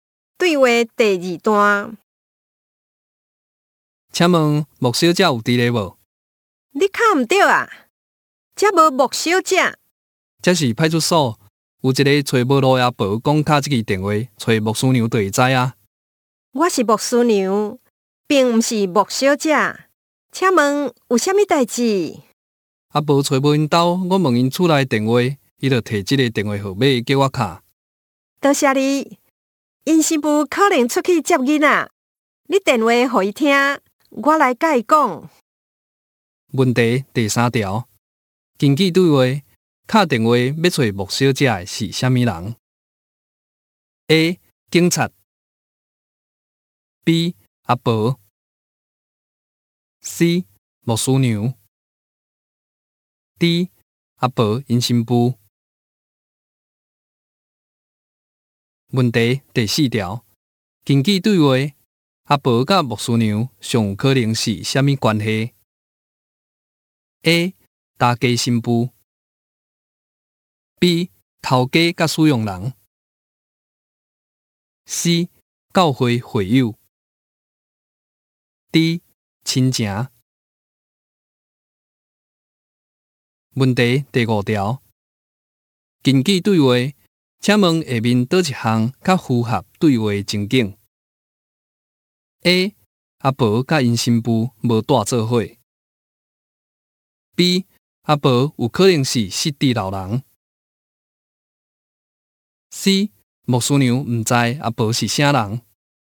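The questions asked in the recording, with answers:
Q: 根据对话,卡电话要找木小姐的是啥物人 ?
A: A: 警察

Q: 根据对话。请问下面哪一项较符合对话情景 ?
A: B: 阿婆有可能是失地老人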